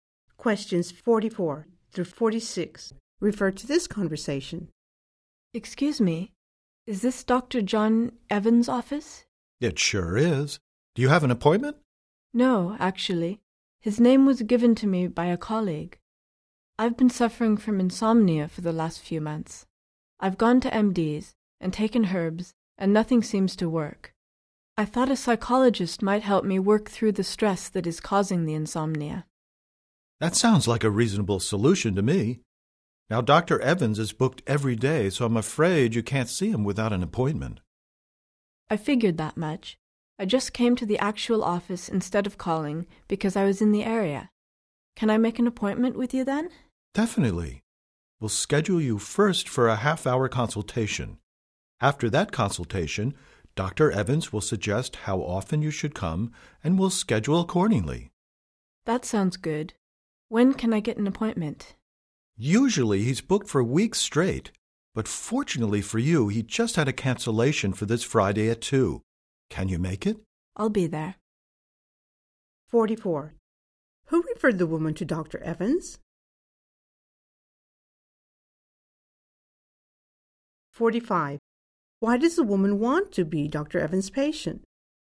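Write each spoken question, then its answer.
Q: Who referred the woman to Dr. Evans?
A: A colleague

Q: Why does the woman want to be Dr. Evans' patient?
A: To work through the stress causing her insomnia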